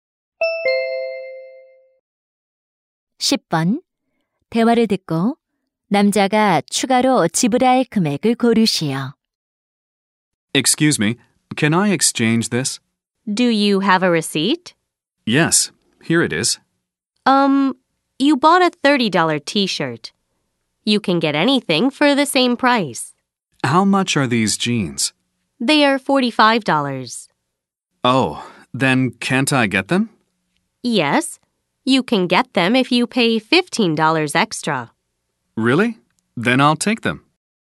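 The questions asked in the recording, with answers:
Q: 대화를 듣고 남자가 추가로 지불할 금액을 고르시오.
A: 15달러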